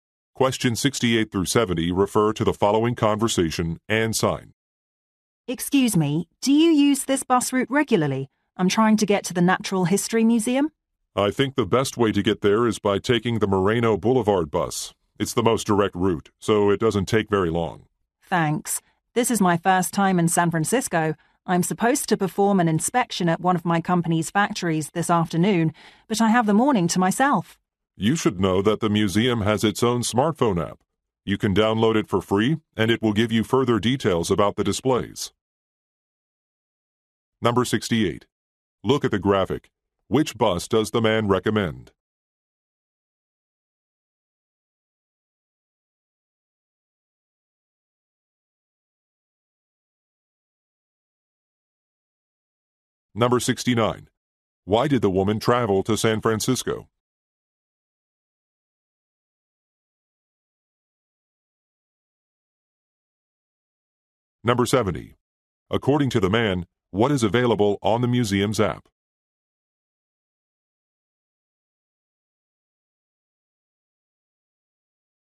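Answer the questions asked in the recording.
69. To inspect a factory
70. Details about the displays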